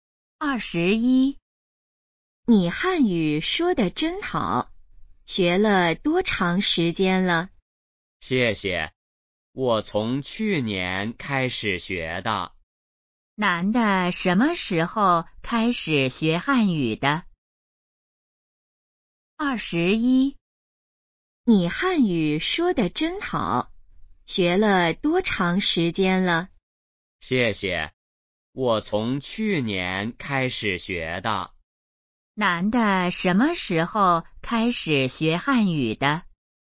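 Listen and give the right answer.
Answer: 去年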